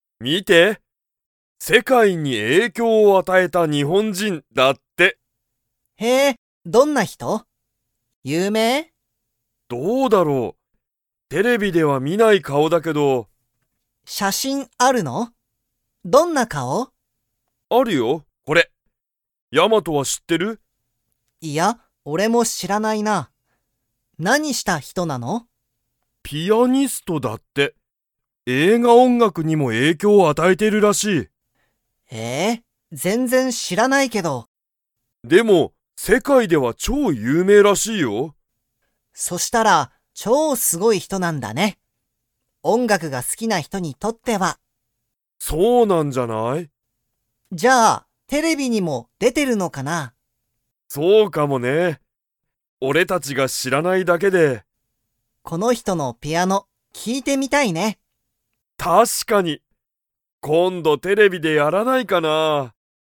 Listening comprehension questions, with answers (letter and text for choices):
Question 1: ヤマトは、その人(ひと)を知(し)っていますか?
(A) はい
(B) いいえ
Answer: (B) いいえ

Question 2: その人(ひと)は、____にも影響与(えいきょうあた)えてるらしい。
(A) 写真(しゃしん)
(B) 有名(ゆうめい)な人(ひと)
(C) 映画音楽(えいがおんがく)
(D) 世界(せかい)のテレビ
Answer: (C) 映画音楽(えいがおんがく)